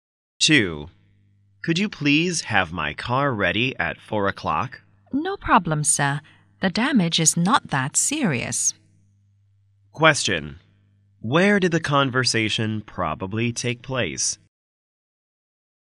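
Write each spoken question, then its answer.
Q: Where did the conversation probably take place?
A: At a car repair shop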